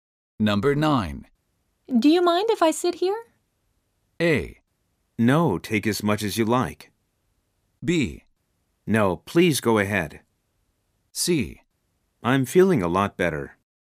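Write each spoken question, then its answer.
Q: Do you mind if I sit here?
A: B: No, please go ahead.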